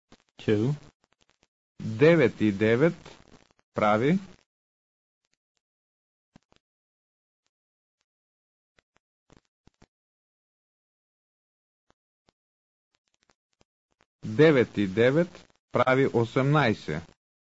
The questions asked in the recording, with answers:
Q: 9 и 9 прави.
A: 9 и 9 прави 18.